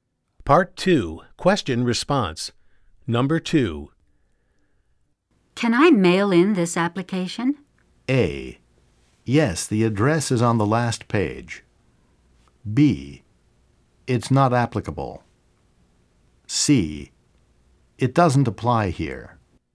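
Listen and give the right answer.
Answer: A: Yes, the address is on the last page.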